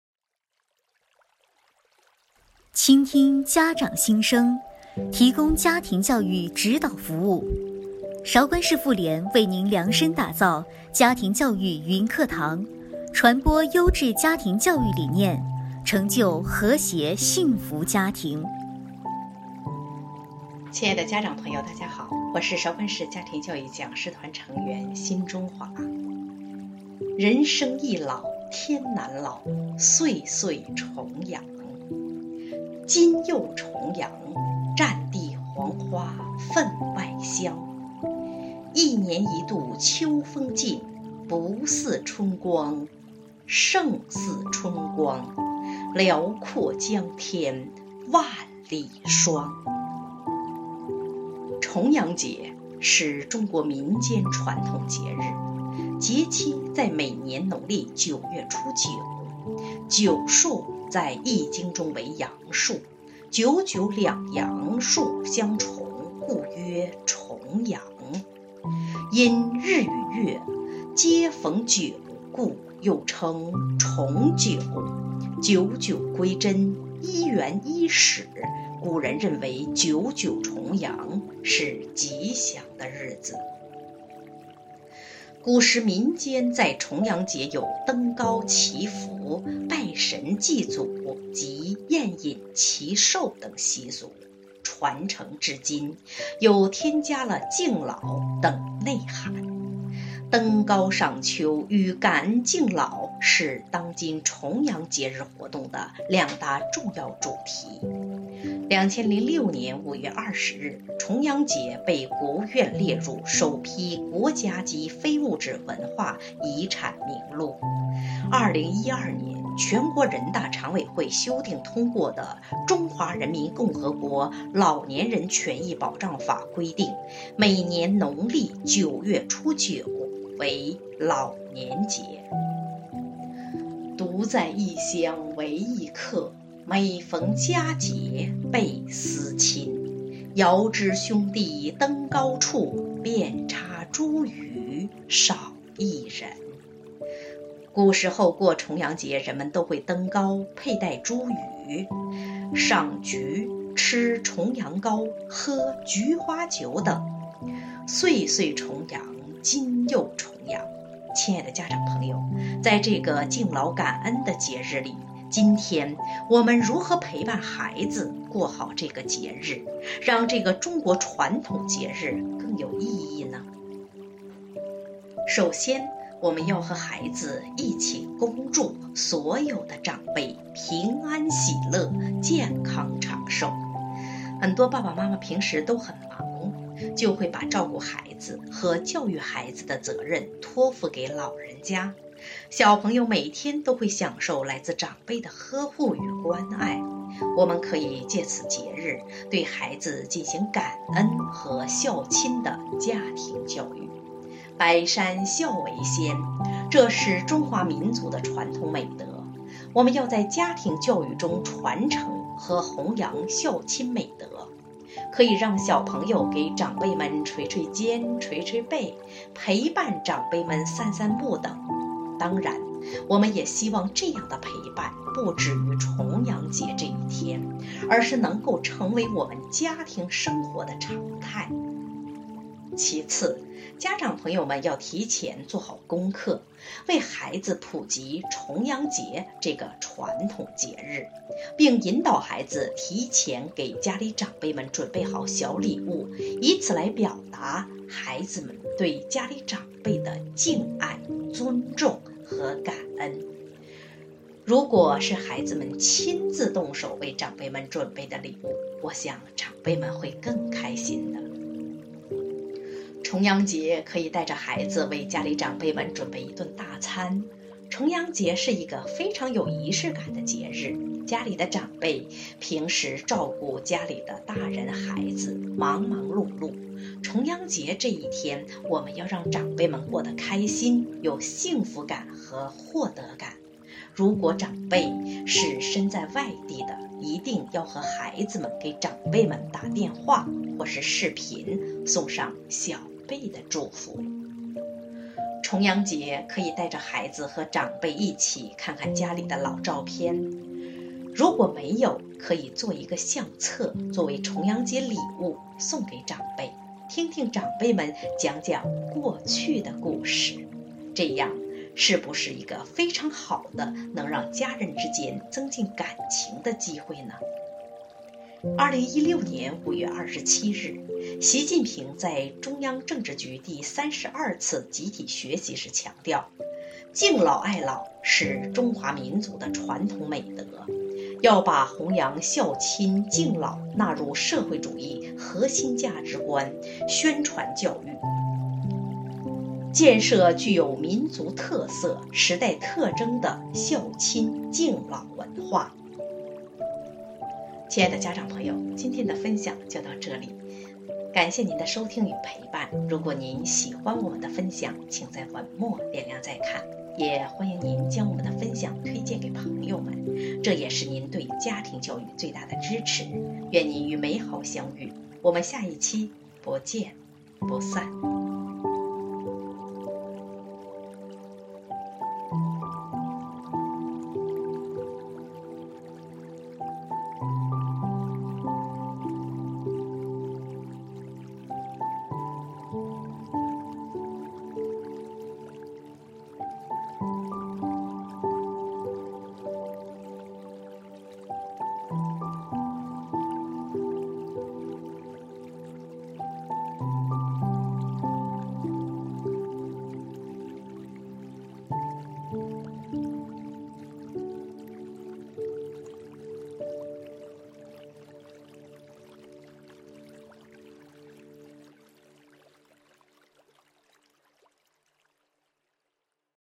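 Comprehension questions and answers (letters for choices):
亲爱的家长朋友们,请带着你们的小孩,一起参与下面的互动问答小游戏吧!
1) 《九月九日忆山东兄弟》是与重阳节有关的一首诗,以下哪句出自此诗?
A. 遥知兄弟登高处,遍插茱萸少一人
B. 九月九日望乡台,他席他乡送客杯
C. 可恨相逢能几日,不知重会是何年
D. 尘世难逢开口笑,菊花须插满头归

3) 重阳节的习俗中与以下哪种花密切相关?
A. 桂花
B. 菊花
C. 荷花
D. 海棠花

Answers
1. A
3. B

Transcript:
"家庭教育云课堂"第三十八期:人生易老天难老,岁岁重阳,今又重阳!-韶关市妇女联合会
您现在的位置:首页>妇联动态>妇联动态
"家庭教育云课堂"第三十八期:人生易老天难老,岁岁重阳,今又重阳!
(音频:人生易老天难老,岁岁重阳,今又重阳!
人生易老天难老,岁岁重阳。今又重阳,战地黄花分外香。一年一度秋风劲,不似春光。胜似春光,寥廓江天万里霜。
重阳节,是中国民间传统节日,节期在每年农历九月初九。"九"数在《易经》中为阳数,"九九"两阳数相重,故曰"重阳";因日与月皆逢九,故又称为"重九"。九九归真,一元肇始,古人认为九九重阳是吉祥的日子。古时民间在重阳节有登高祈福、拜神祭祖及饮宴祈寿等习俗。传承至今,又添加了敬老等内涵。登高赏秋与感恩敬老是当今重阳节日活动的两大重要主题。2006年5月20日,重阳节被国务院列入首批国家级非物质文化遗产名录。2012年全国人大常委会修订通过的《中华人民共和国老年人权益保障法》规定每年农历九月初九为老年节。
独在异乡为异客,每逢佳节倍思亲。遥知兄弟登高处,遍插茱萸少一人。古时候过重阳节人们都会登高、佩戴茱萸,赏菊,吃重阳糕,喝菊花酒等。
岁岁重阳,今又重阳。亲爱的家长朋友,在这个敬老感恩的节日里,今天,我们如何陪伴孩子过好这个节日,让这个中国传统节日更有意义呢?
首先我们要和孩子一起恭祝所有的长辈:平安喜乐,健康长寿!很多爸爸妈妈平时都很忙,就会把照顾孩子和教育孩子的责任托付给老人家,小朋友每天都会享受来之长辈的呵护与关爱。我们可以借此节日,对孩子进行感恩和孝亲的家庭教育。百善孝为先,这是中华民族的传统美德,我们要在家庭教育中传承和弘扬孝亲美德。可以让小朋友们给长辈们捶捶肩,捶捶背,陪伴长辈们散散步等,当然我们也希望这样的陪伴不止于重阳节这一天,而是能够成为我们家庭生活的常态。
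其次,家长朋老友们要提前做好功课,为孩子普及重阳节这个传统节日。并引导孩子提前给家里长辈们准备好小礼物,以此来表达孩子们对家里长辈的敬爱、尊重和感恩,如果是孩子们亲自动手为长辈们准备的礼物,我想长辈们会更开心的。
重阳节,可以带着孩子为家里长辈们准备一顿大餐。重阳节是一个非常有仪式感的节日,家里的长辈平时照顾家里的大人孩子,忙忙碌碌,重阳节这一天我们要让长辈们过得开心,有幸福感和获得感。如果长辈是身在外地的,一定要和孩子们给长辈们打电话或是视频,送上小辈的祝福。
重阳节,可以带着孩子和长辈一起看看家里的老照片,如果没有,可以做一个相册作为重阳节礼物送给长辈,听听长辈们讲讲过去的事情,这样,是不是一个非常好的能让家人之间增进感情的机会呢!
2016年5月27日,习近平在中央政治局第三十二次集体学习时强调:敬老爱老是中华民族的传统美德。要把弘扬孝亲敬老纳入社会主义核心价值观宣传教育,建设具有民族特色、时代特征的孝亲敬老文化。
亲爱的家长朋友们,今天的分享就到这里,感谢您的收听与陪伴,如果您喜欢我们的分享,请在文末点亮再看,也欢迎您将我们的分享推荐给朋友们,这也是您对家庭教育最大的支持,愿你与美好相遇。我们下一期,不见不散!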